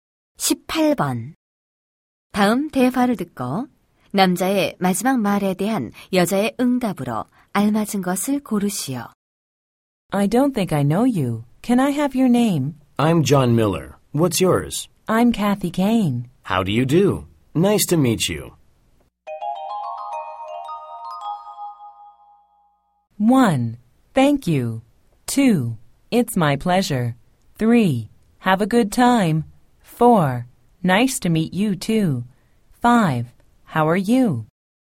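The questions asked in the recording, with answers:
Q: 다음 대화를 듣고 남자의 마지막 말에 대한 여자의 응답으로 알맞은 것을 고르시오.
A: 4: Nice to meet you too.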